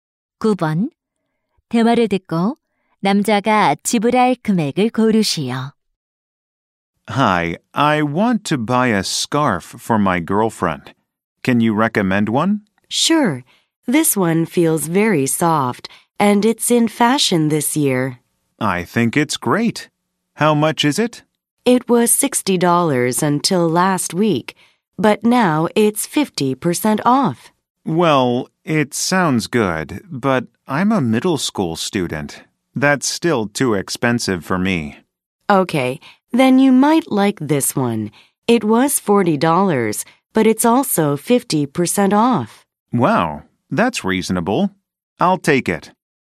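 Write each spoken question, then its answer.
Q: 대화를 듣고 남자가 지불할 금액을 고르시오.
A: $20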